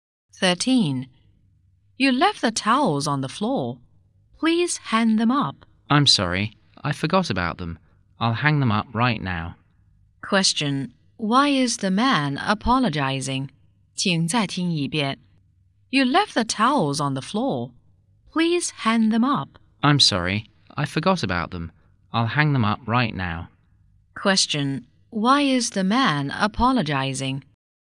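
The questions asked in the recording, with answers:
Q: Question, why is the man apologizing?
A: He forgot to hang up the towels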